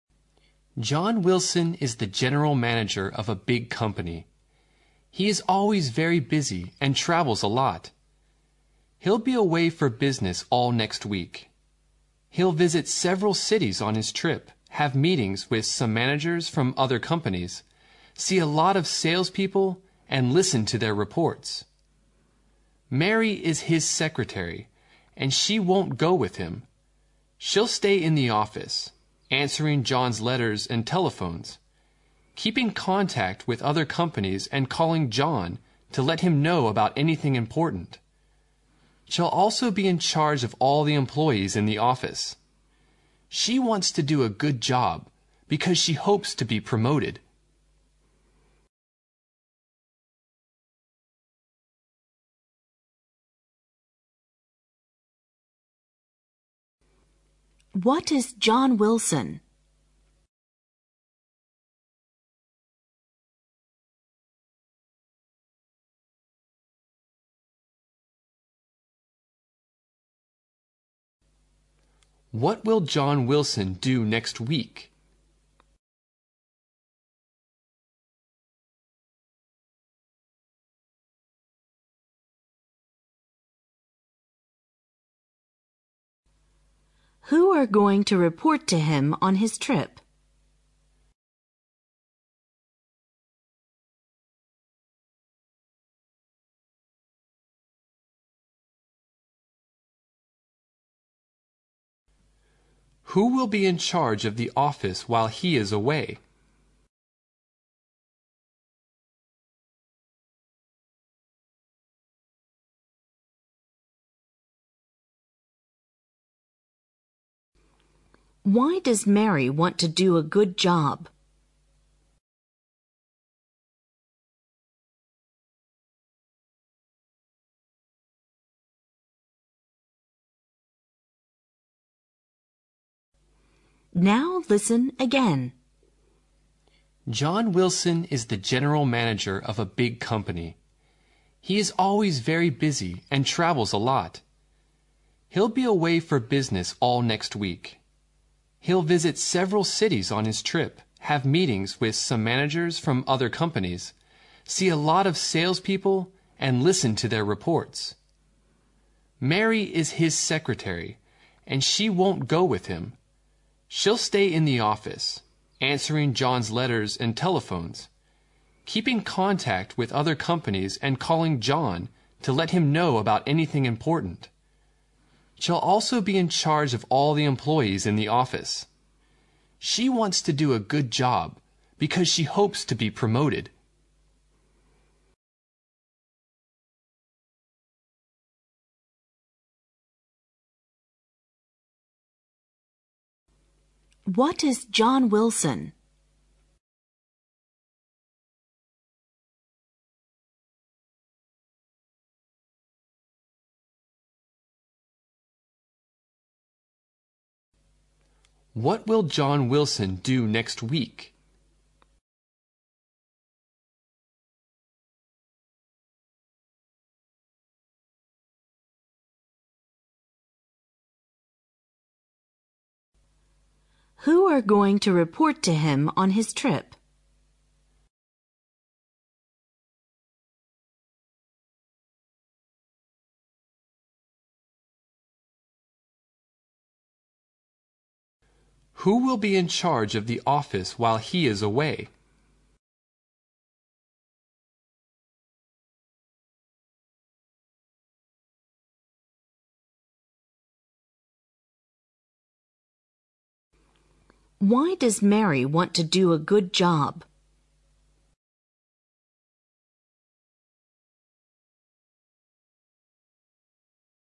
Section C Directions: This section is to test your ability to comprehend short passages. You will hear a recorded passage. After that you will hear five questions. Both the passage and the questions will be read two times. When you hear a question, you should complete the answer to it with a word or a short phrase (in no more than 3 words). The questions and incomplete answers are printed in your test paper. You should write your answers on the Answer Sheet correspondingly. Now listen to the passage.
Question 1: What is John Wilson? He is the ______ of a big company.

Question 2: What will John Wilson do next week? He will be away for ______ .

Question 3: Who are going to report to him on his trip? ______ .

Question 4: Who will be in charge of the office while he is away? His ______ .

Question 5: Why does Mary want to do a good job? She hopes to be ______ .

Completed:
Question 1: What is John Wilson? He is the general manager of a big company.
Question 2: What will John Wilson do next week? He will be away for business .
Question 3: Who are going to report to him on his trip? Salespeople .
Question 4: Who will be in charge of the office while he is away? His secretary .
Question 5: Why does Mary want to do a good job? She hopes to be promoted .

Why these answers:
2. 题目询问"约翰·威尔逊下一周要做什么?"。 由短文中的He'll be away for business all next week可知空白处应填写business一词。
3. 题目询问"谁将会在他(约翰·威尔逊)的旅途 中向他作汇报?"。短文提到了约翰·威尔逊将在旅途 中see a lot of salespeople and listen to their reports,句中的their reports指的就是salespeople的汇 报,因此,本题应填写Salespeople。
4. 题目询问"约翰·威尔逊不在的时候,谁管理 办公室的事务?"短文提到了She'll also be in charge of all the employees...,其中She指的是约翰·威尔逊的秘书,可以得知空格处应填入secretary。
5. 题目询问"为什么玛丽想要把工作做好?"。由 短文的结尾处的...because she hopes to be pro-rooted可知空格处应填入最后一个词promoted。